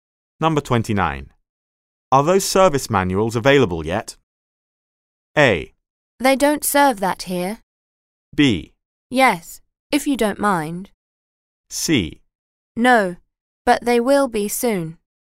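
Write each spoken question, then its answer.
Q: Are those service manuals available yet?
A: C: No, but they will be soon.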